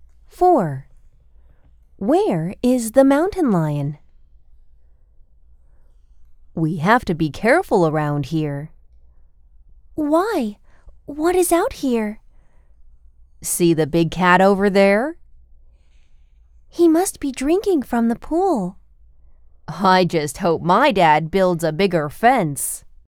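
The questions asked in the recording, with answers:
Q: Where is the mountain lion?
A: Near the pool, drinking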